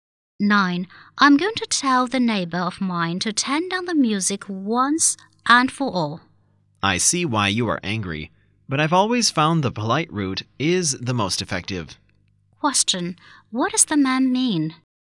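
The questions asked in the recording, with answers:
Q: What does the man mean?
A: She should ask the neighbor politely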